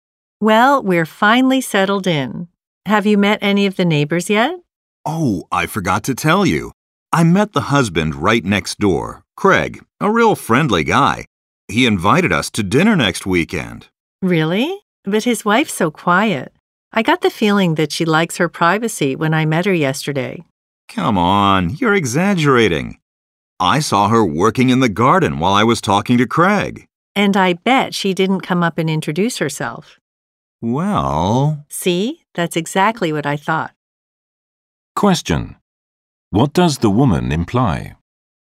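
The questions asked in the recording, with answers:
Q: What does the woman imply?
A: The neighbor's wife seems unsociable; she likes to keep to herself.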